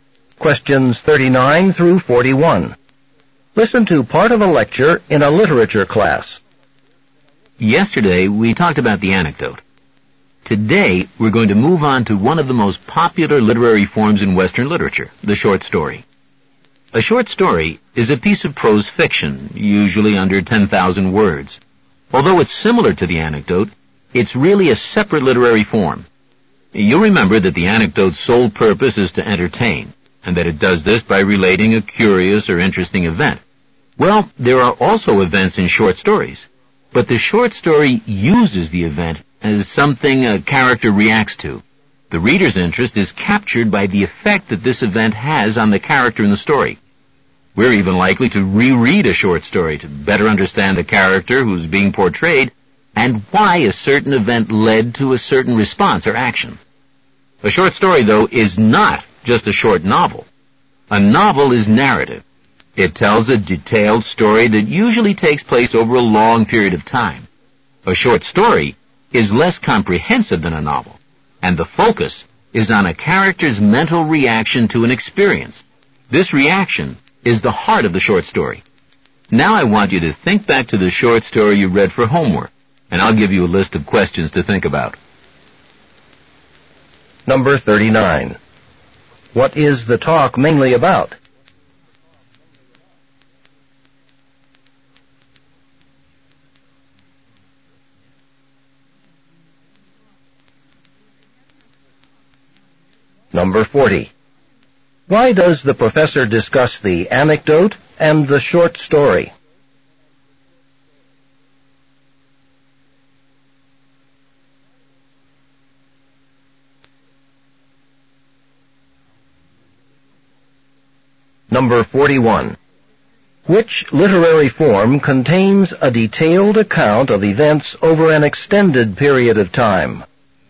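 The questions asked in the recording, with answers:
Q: What is the talk mainly about?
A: The short story as a literary form

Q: Which literary form contains a detailed account of events over an extended period of time?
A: The novel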